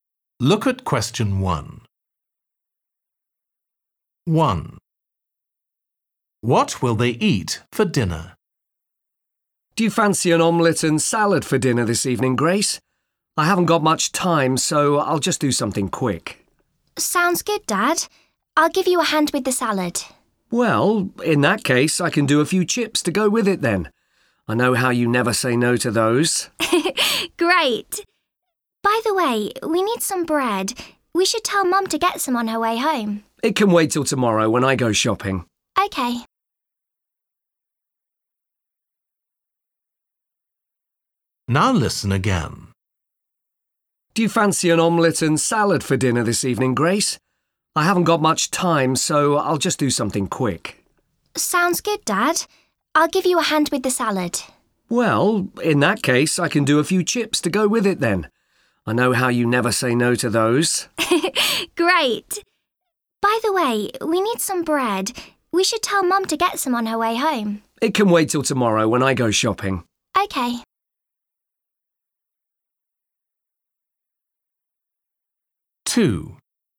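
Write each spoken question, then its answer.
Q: What will they eat for dinner?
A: Omelette, salad and chips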